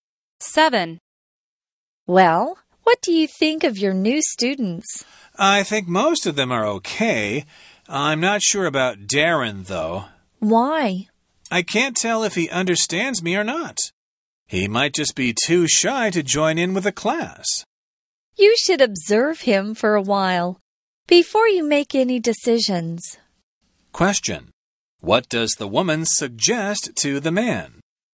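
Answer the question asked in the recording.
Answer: To observe Darren for a while before making any decisions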